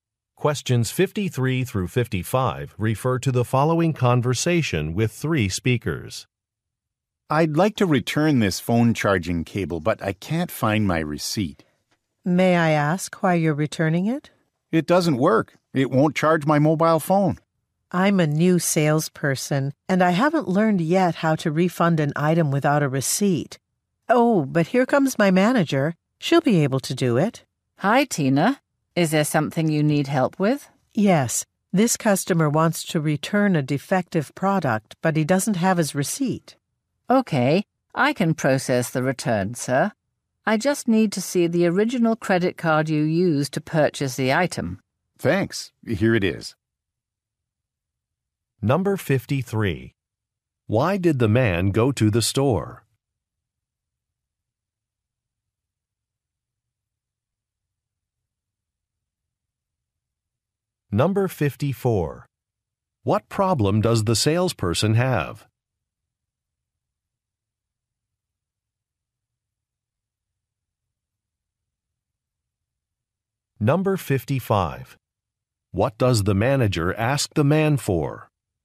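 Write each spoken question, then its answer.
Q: Why did the man go to the store?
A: To return a phone charging cable

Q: What problem does the salesperson have?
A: She doesn't know how to refund without a receipt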